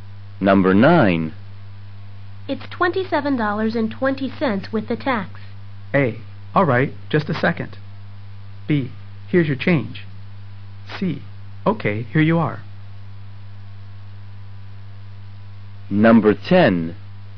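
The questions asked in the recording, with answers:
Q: It's $27.20 with the tax.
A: C: Okay, here you are.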